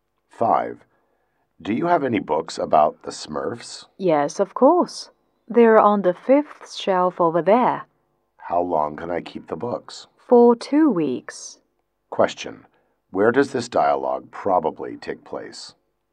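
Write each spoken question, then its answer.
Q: Where does this dialogue probably take place?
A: In a library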